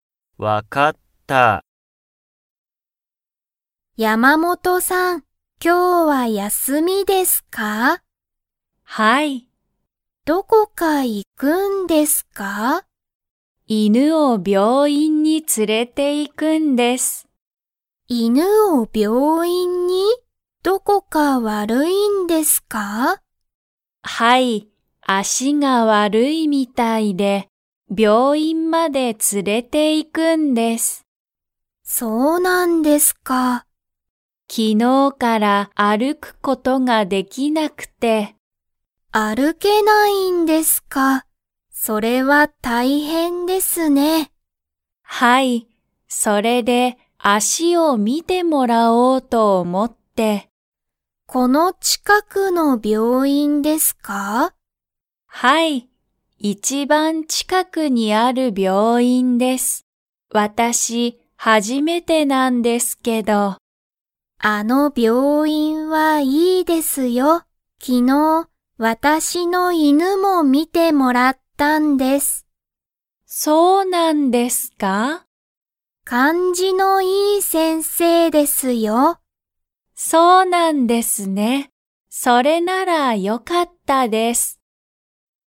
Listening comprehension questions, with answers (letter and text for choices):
Comprehension Quiz (Skip if you don't understand the conversation yet)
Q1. 山本(やまもと)さんの犬(いぬ)は、昨日(きのう)から____ができない。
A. 連(つ)れていくこと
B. 歩(ある)くこと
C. 見みること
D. 悪(わる)いこと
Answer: B. 歩(ある)くこと

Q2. 山本(やまもと)さんは昨日(きのう)、その病院(びょういん)に行(い)きましたか?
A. はい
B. いいえ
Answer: B. いいえ

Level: Level 2